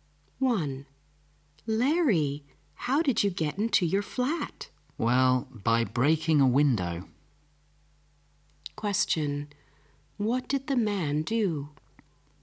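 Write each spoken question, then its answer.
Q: What did the man do?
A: He broke a window to get into his flat.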